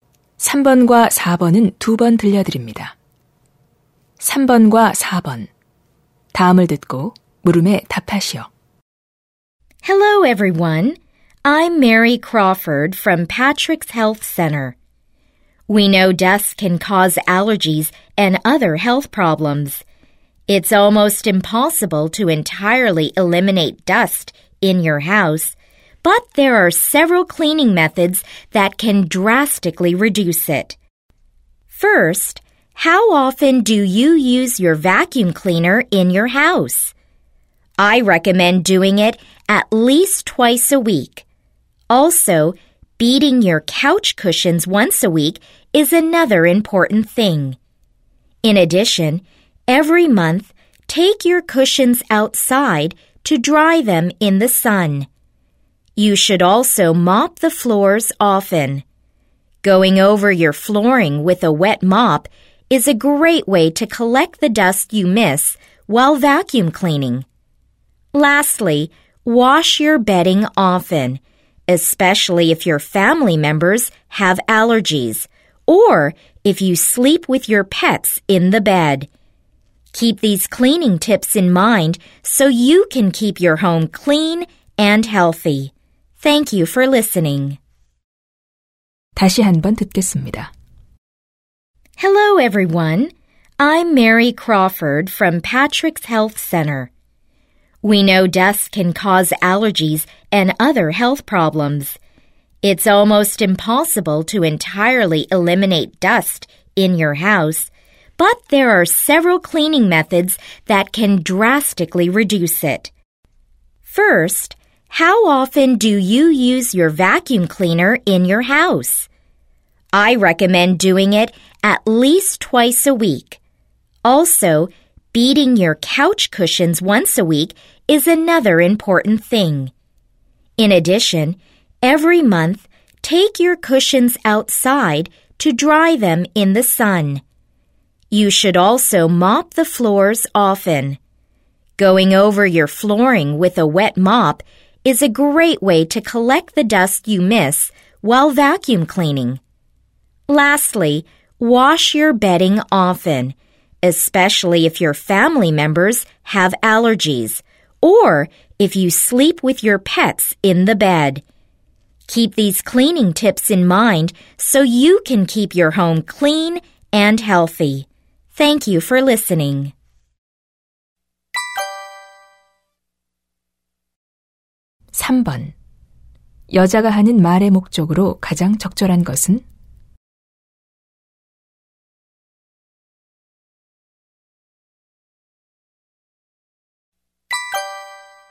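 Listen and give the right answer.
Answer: 집 안 먼지를 줄이는 청소 방법을 알려 주려고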